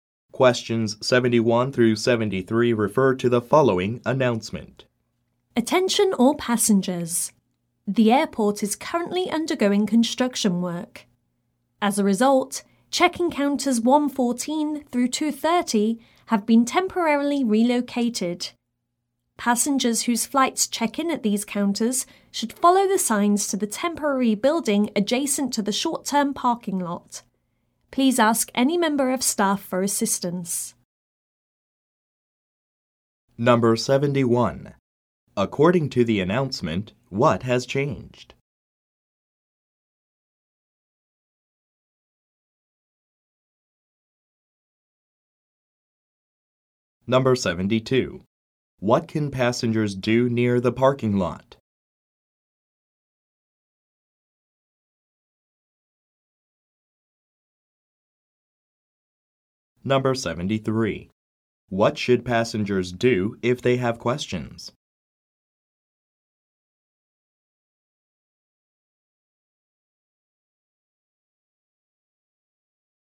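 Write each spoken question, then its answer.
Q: According to the announcement, what has changed?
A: Some check-in counters have been temporarily relocated

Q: What can passengers do near the parking lot?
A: Check in for their flights at the temporary building

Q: What should passengers do if they have questions?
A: Ask a member of staff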